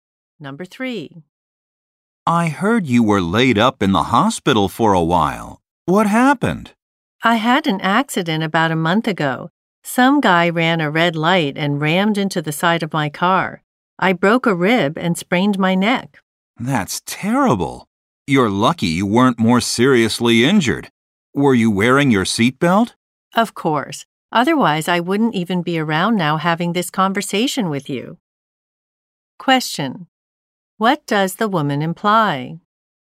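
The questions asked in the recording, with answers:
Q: What does the woman imply?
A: Her seatbelt saved her life.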